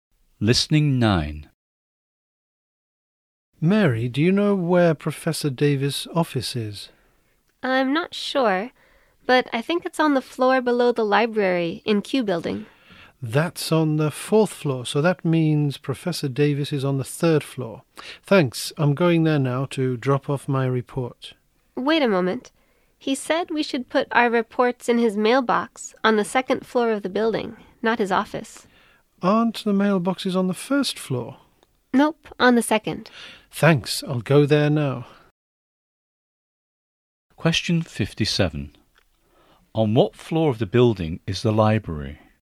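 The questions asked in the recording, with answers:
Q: On what floor of the building is the library?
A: The fourth floor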